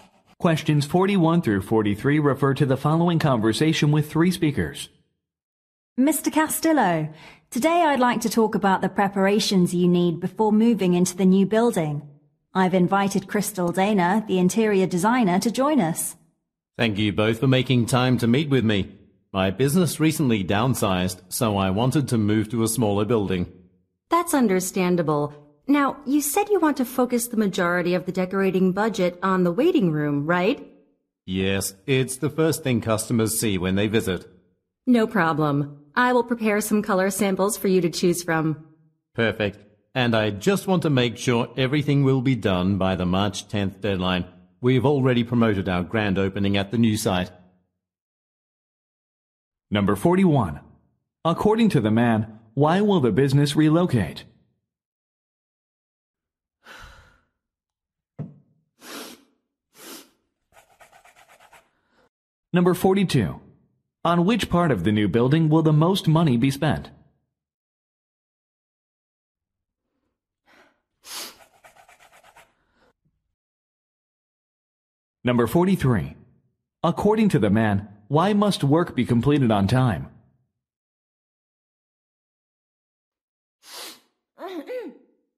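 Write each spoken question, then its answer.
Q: According to the man, why will the business relocate?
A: The business has downsized

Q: On which part of the new building will the most money be spent?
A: The waiting room

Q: Why must work be completed on time?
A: A grand opening has already been promoted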